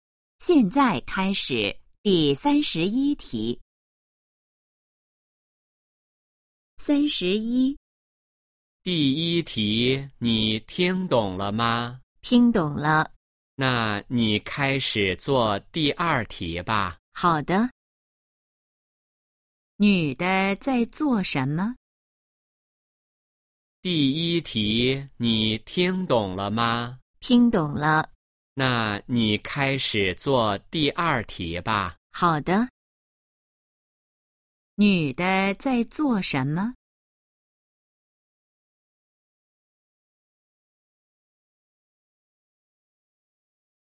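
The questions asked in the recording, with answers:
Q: 女的在做什么?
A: 做题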